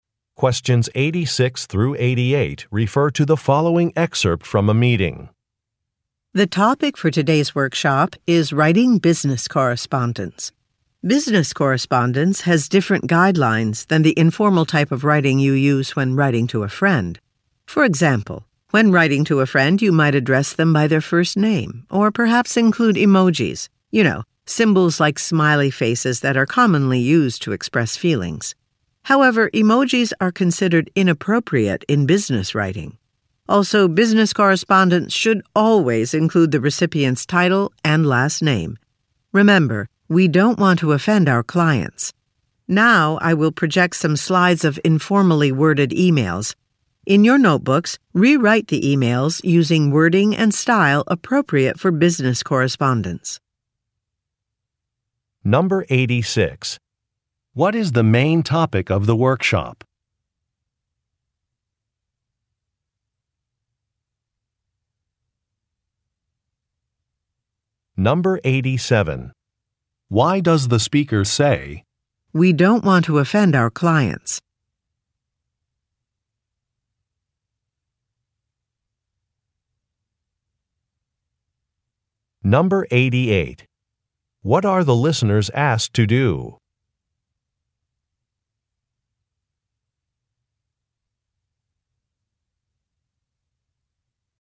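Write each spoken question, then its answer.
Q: What is the main topic of the workshop?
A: Writing business correspondence

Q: What are the listeners asked to do?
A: Rewrite informal emails in a business style in their notebooks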